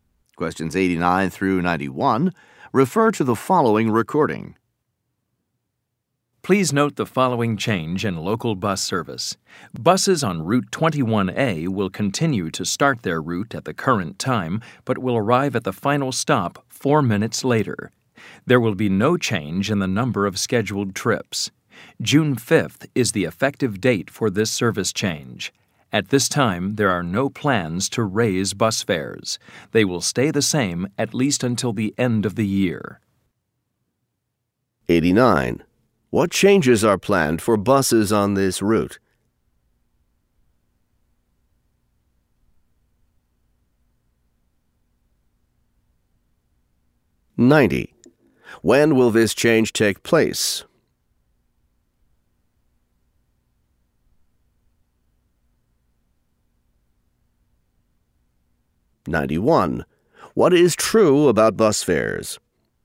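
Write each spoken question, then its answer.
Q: What changes are planned for buses on this route?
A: They will arrive at the final stop 4 minutes later

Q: When will this change take place?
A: June 5th

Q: What is true about bus fares?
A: They will stay the same at least until the end of the year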